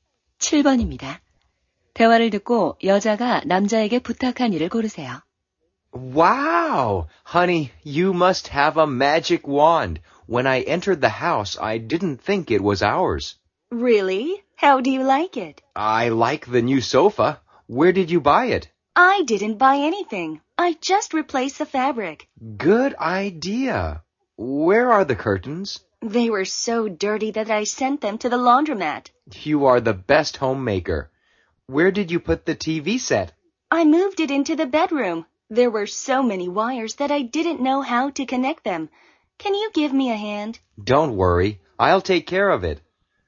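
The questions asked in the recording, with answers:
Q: 대화를 듣고 여자가 남자에게 부탁한 일을 고르세요.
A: TV 선 연결하기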